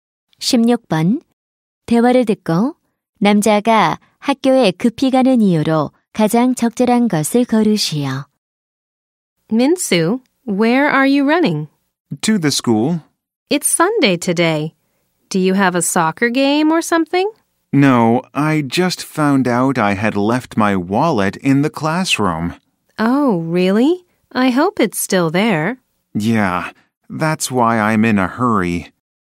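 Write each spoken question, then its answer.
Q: 대화를 듣고 남자가 학교에 급히 가는 이유로 가장 적절한 것을 거르시오.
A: 교실에 두고 온 지갑을 찾으려고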